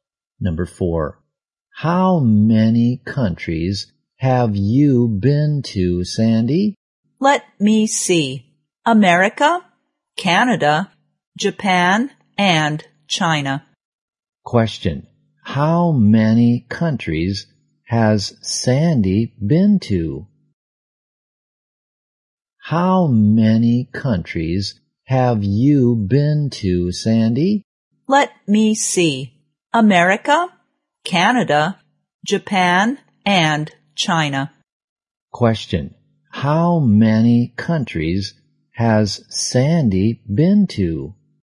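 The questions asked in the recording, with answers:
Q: How many countries has Sandy been to?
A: Four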